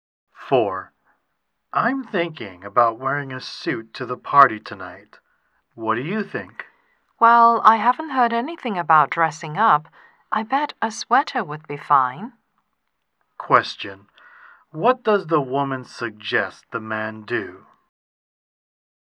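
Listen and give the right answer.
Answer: Wear a sweater instead of a suit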